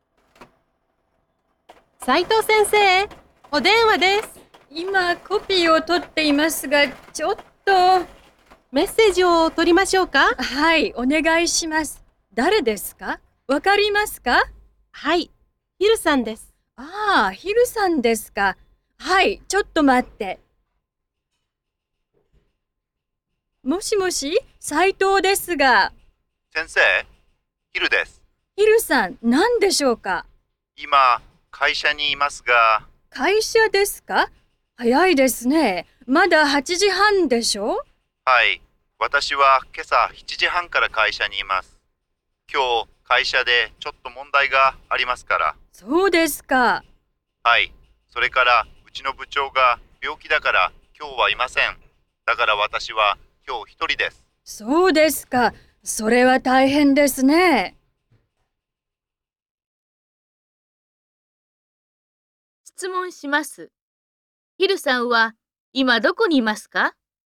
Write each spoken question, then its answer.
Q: ヒルさんは今どこにいますか?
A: 会社にいます。